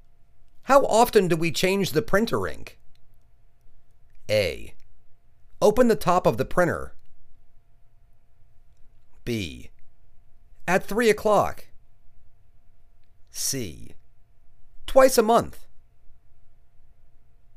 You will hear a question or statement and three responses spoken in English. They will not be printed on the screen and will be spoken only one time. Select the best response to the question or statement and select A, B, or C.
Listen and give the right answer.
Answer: Twice a month